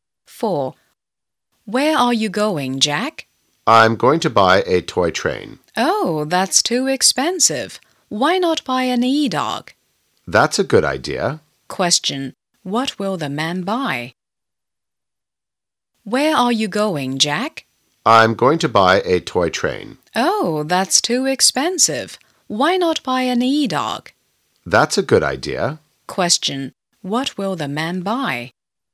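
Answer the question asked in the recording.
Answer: An e-dog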